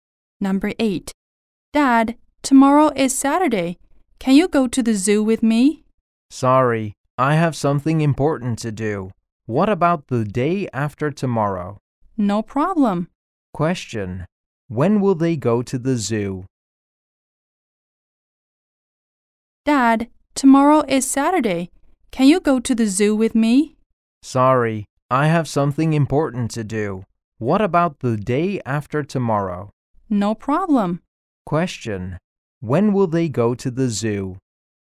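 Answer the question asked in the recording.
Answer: On Sunday (the day after tomorrow)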